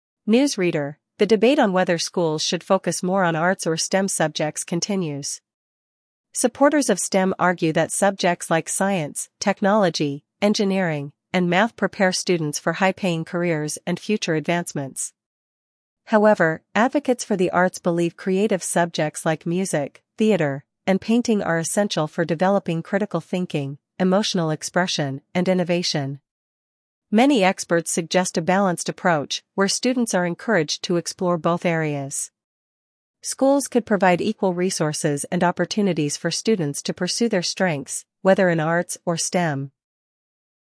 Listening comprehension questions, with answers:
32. What do supporters of STEM subjects believe?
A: STEM prepares students for future careers

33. Name two examples of STEM subjects mentioned.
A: Science, technology

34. What benefits do arts subjects offer?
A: Critical thinking and emotional expression

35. List two examples of creative subjects mentioned.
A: Music, painting

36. What balanced solution do experts propose?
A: A balanced approach

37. What do advocates for the arts emphasize?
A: Innovation and creativity

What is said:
News Reader: The debate on whether schools should focus more on arts or STEM subjects continues. Supporters of STEM argue that subjects like science, technology, engineering, and math prepare students for high-paying careers and future advancements.
However, advocates for the arts believe creative subjects like music, theater, and painting are essential for developing critical thinking, emotional expression, and innovation.
Many experts suggest a balanced approach, where students are encouraged to explore both areas. Schools could provide equal resources and opportunities for students to pursue their strengths, whether in arts or STEM.